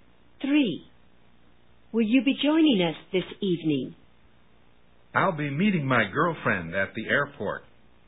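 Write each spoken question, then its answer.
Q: What does the man mean?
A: He won't join them because he'll be meeting his girlfriend at the airport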